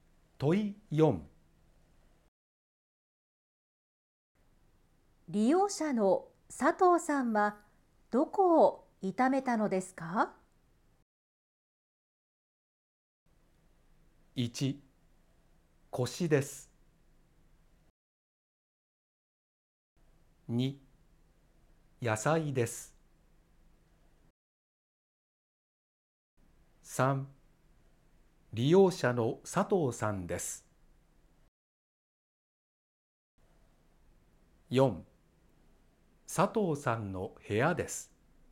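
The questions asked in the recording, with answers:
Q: 利用者の佐藤さんはどこを痛めたのですか?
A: 1: 腰です。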